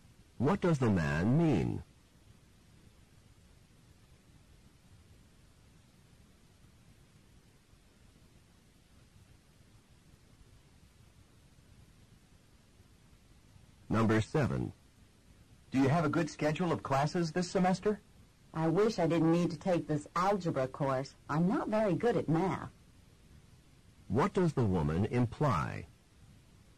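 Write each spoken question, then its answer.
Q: What does the woman imply?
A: She has to take algebra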